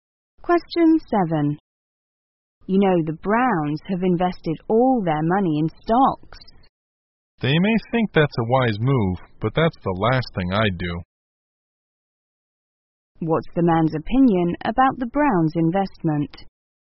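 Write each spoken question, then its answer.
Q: What's the man's opinion about the Browns' investment?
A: It's unwise; he would never do it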